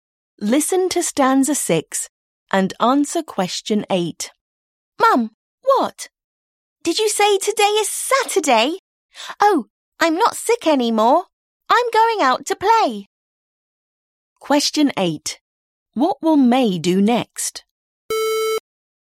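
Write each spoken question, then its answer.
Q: What will May do next?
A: Go out to play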